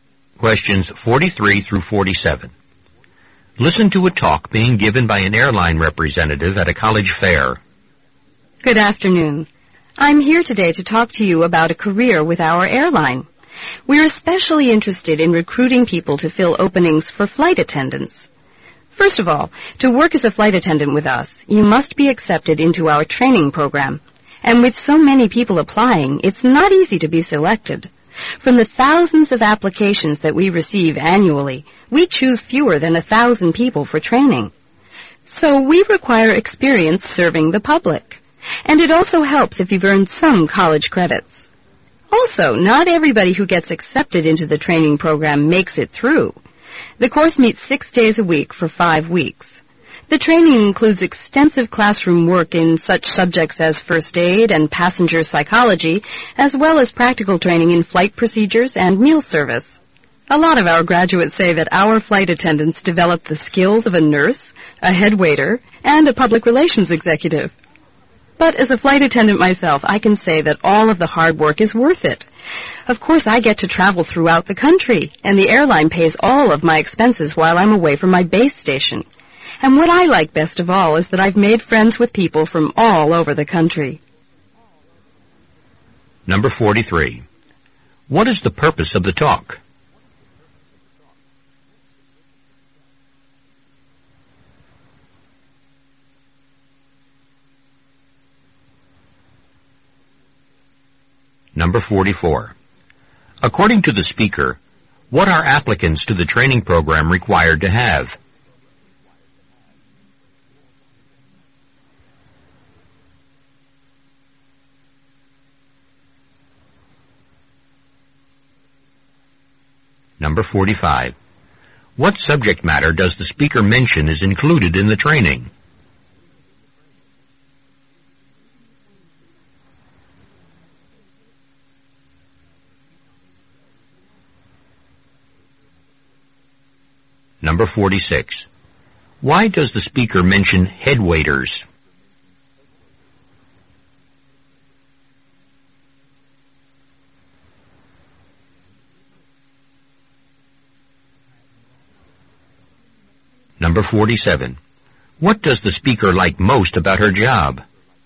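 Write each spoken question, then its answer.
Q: What is the purpose of the talk?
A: To recruit flight attendants for the airline

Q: According to the speaker, what are applicants to the training program required to have?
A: Experience serving the public

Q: What subject matter does the speaker mention is included in the training?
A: First aid and passenger psychology

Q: Why does the speaker mention head waiters?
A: To show the variety of skills flight attendants develop

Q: What does the speaker like most about her job?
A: Making friends with people from all over the country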